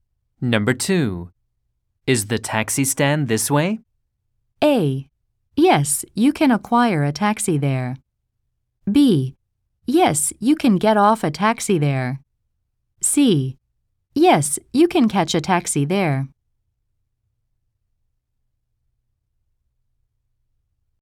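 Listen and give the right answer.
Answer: C: Yes, you can catch a taxi there.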